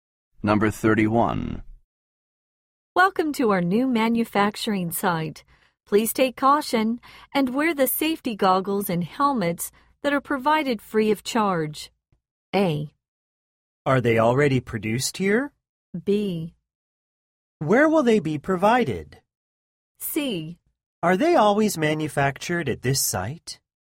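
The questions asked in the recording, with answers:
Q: Please take caution and wear the safety goggles and helmets that are provided free of charge.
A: B: Where will they be provided?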